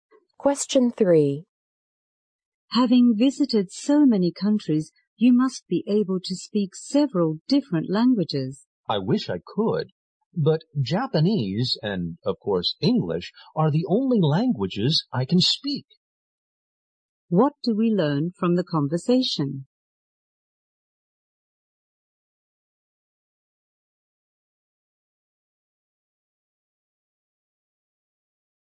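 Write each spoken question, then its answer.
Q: What do we learn from the conversation?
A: The man speaks only Japanese and English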